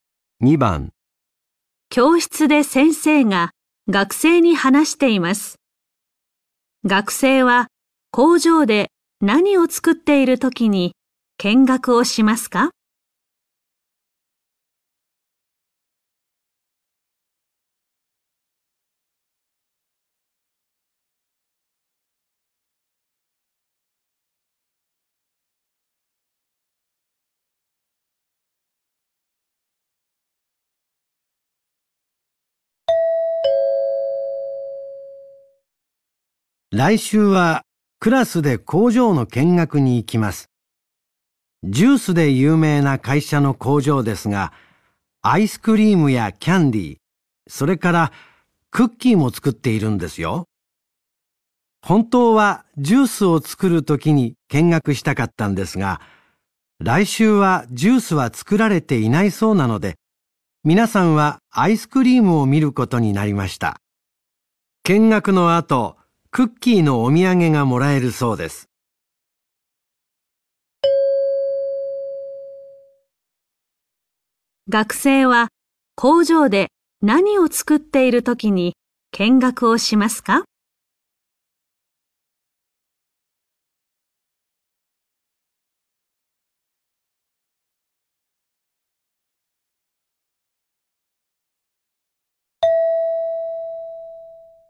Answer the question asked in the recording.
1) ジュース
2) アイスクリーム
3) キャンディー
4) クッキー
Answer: 2) アイスクリーム

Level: N4 Listening · Test 1